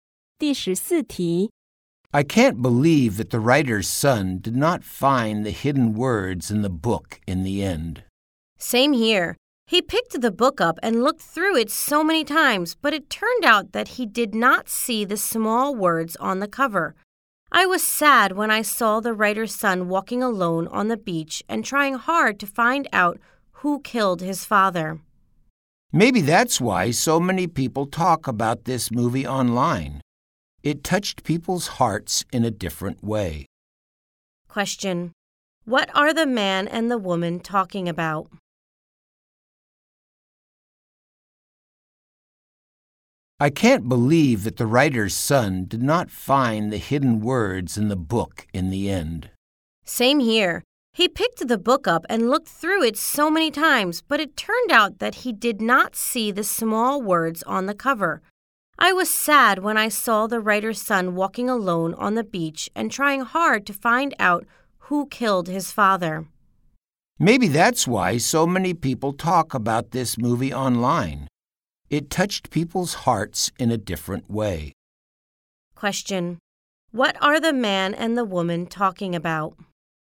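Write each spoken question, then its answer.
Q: Question: What are the man and the woman talking about?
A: A movie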